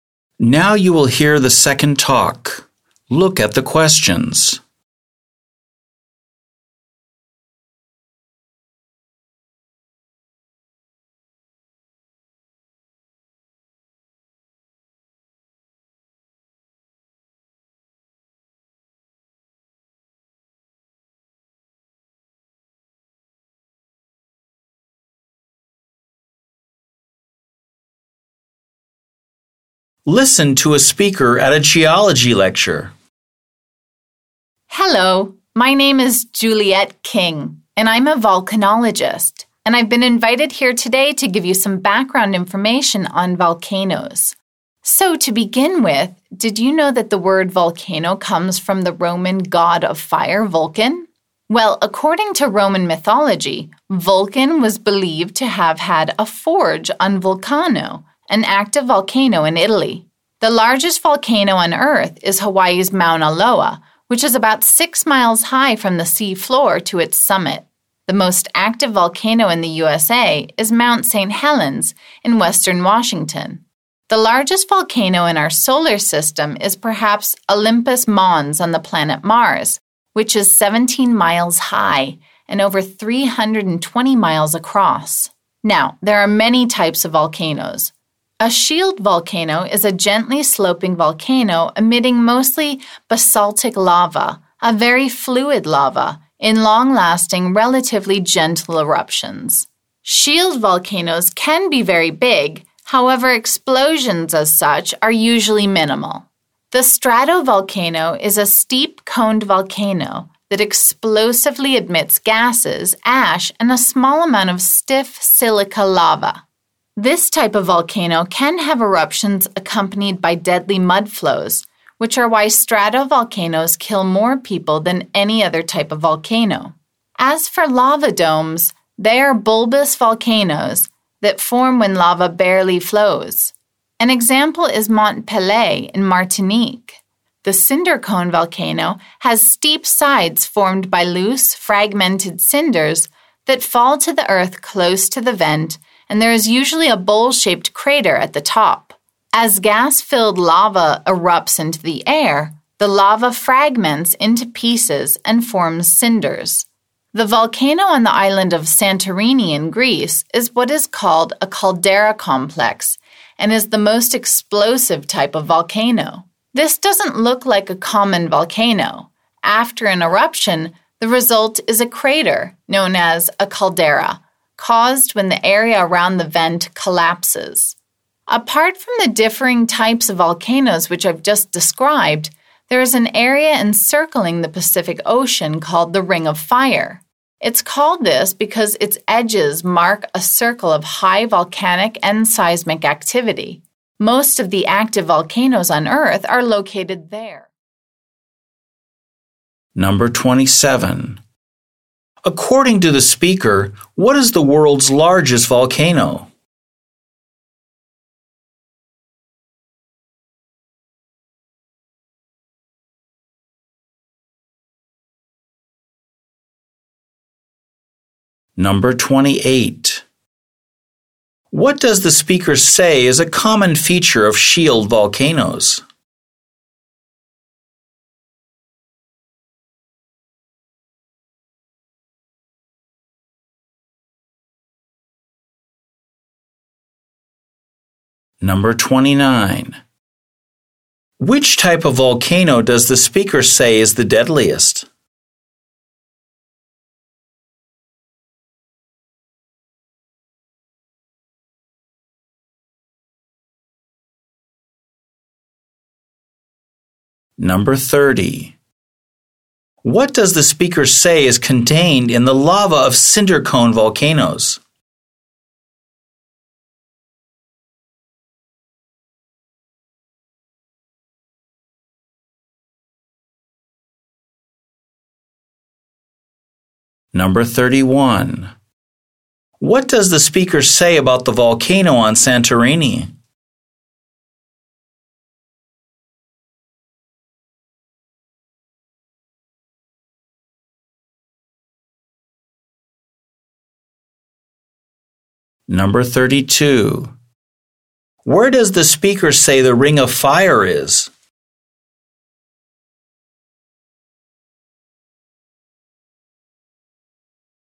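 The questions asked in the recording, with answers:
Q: According to the speaker, what is the world's largest volcano?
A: Mauna Loa in Hawaii

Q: What does the speaker say is a common feature of shield volcanoes?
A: Gentle, long-lasting eruptions of fluid basaltic lava with few explosions

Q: Which type of volcano does the speaker say is the deadliest?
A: The stratovolcano

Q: What does the speaker say is contained in the lava of cinder cone volcanoes?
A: Gas

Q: What does the speaker say about the volcano on Santorini?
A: It is a caldera complex, the most explosive type of volcano

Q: Where does the speaker say the Ring of Fire is?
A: Around the Pacific Ocean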